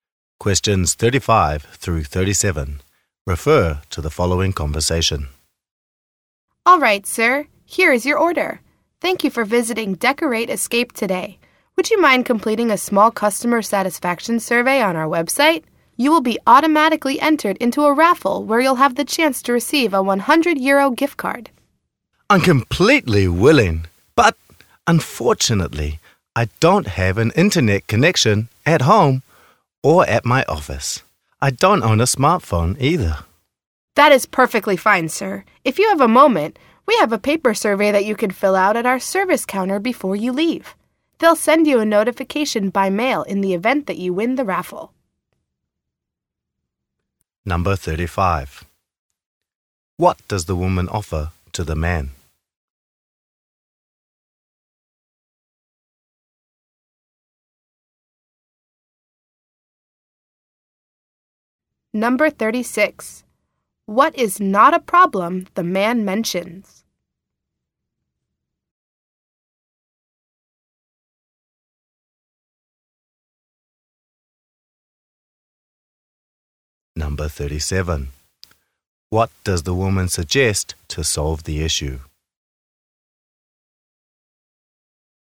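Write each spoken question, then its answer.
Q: What does the woman offer to the man?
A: Entry into a raffle for a 100 euro gift card for completing a survey

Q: What does the woman suggest to solve the issue?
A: Filling out a paper survey at the service counter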